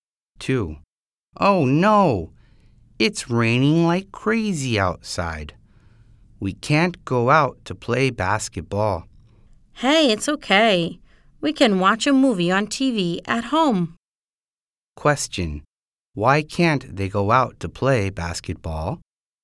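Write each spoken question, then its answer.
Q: Why can't they go out to play basketball?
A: Because it's raining hard.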